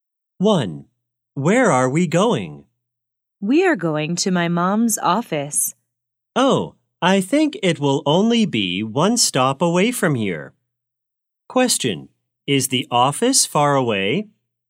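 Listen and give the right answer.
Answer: No, it is only one stop away.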